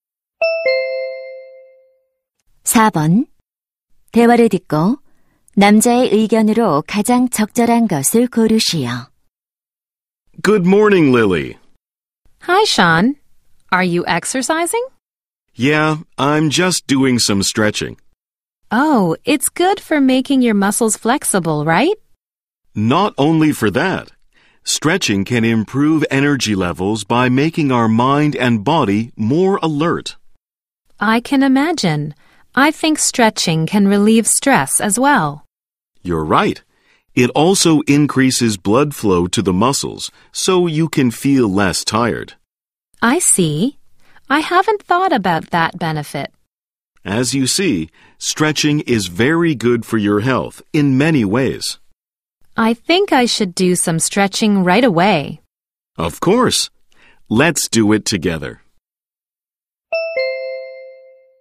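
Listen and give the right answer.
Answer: 스트레칭은 여러 면에서 건강에 좋다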